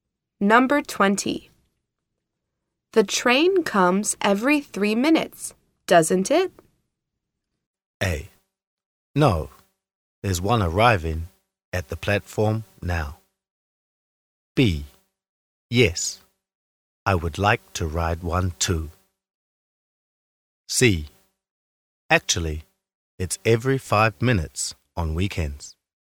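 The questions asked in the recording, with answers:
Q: The train comes every 3 minutes, doesn't it?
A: C: Actually, it's every 5 minutes on weekends.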